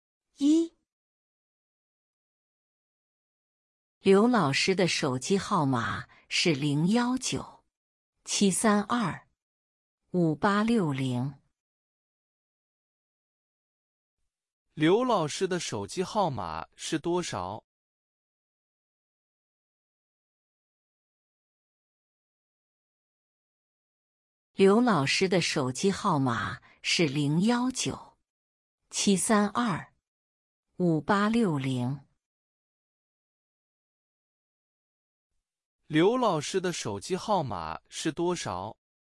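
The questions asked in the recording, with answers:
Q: 刘老师的手机号码是多少?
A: 019-732-5860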